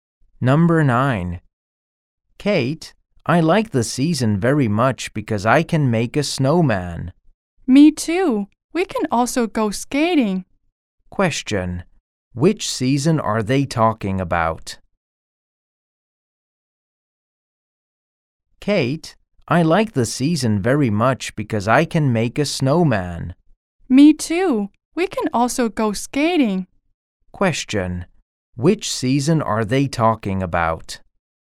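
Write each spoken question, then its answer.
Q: Which season are they talking about?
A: Winter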